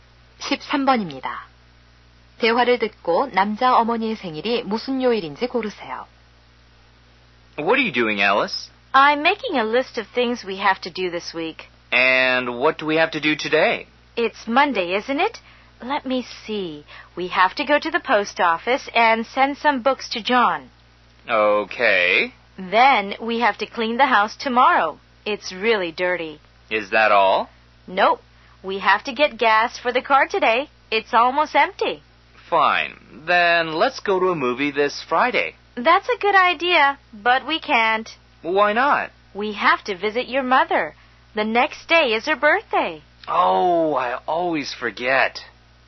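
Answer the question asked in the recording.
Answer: 토요일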